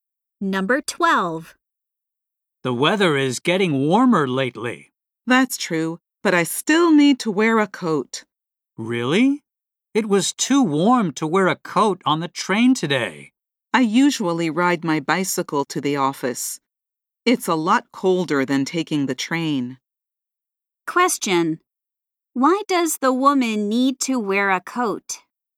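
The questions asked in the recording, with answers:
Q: Why does the woman need to wear a coat?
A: She rides her bicycle to the office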